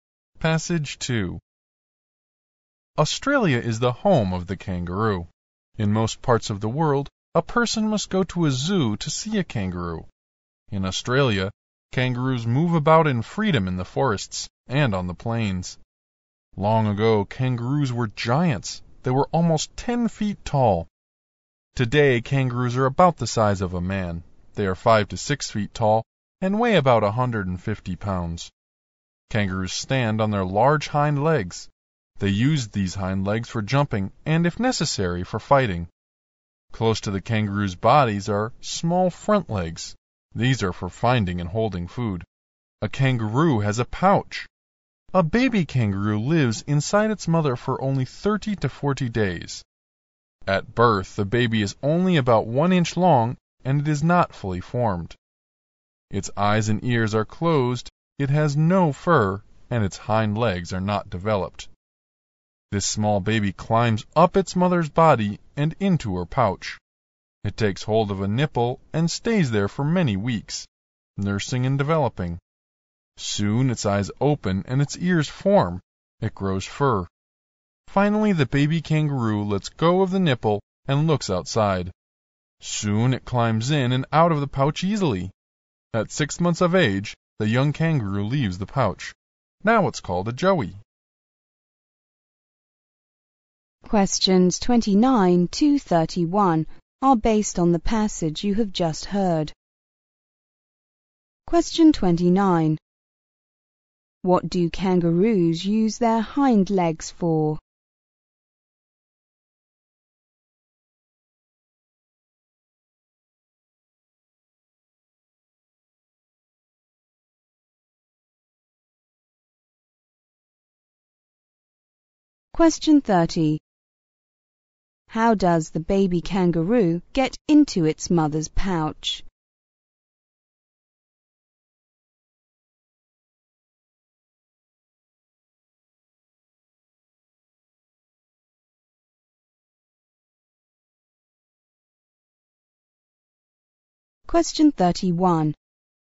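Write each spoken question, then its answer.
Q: What do kangaroos use their hind legs for?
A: Jumping and fighting

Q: How does the baby kangaroo get into its mother's pouch?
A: It climbs up its mother's body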